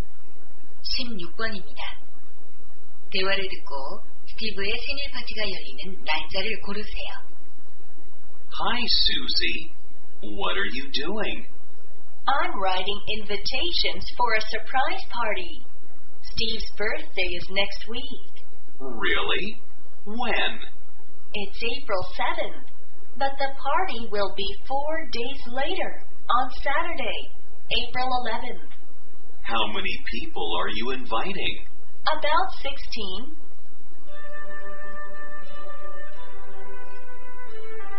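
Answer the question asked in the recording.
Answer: 4월 11일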